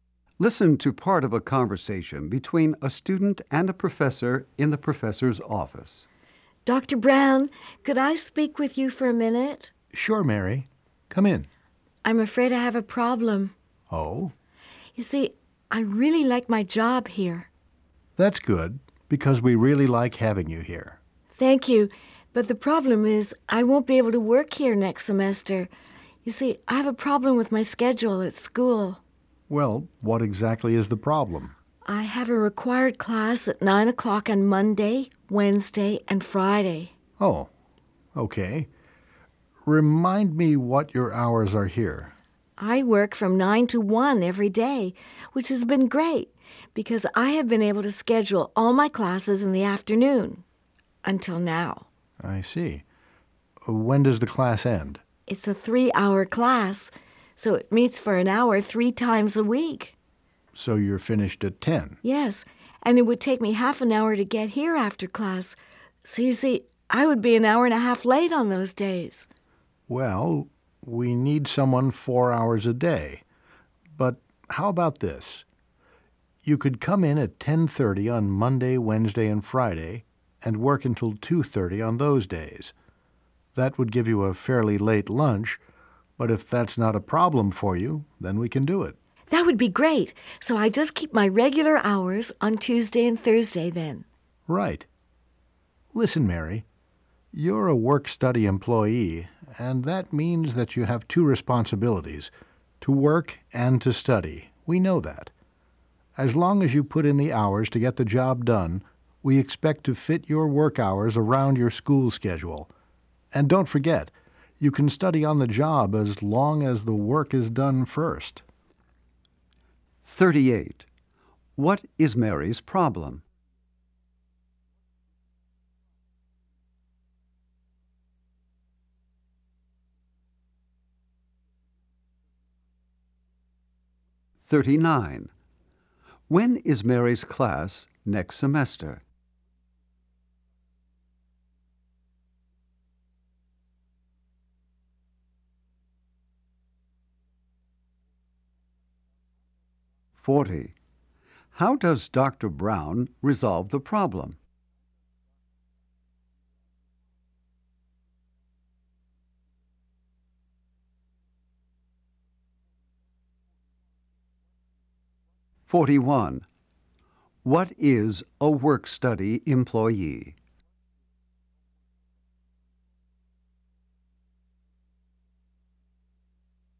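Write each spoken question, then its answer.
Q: What is Mary's problem?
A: Her class next semester conflicts with her work hours

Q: When is Mary's class next semester?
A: At 9 o'clock on Monday, Wednesday and Friday

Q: How does Dr. Brown resolve the problem?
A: Mary will work from 10:30 to 2:30 on Monday, Wednesday and Friday

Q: What is a work-study employee?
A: A student who both works and studies, with work hours fitted around classes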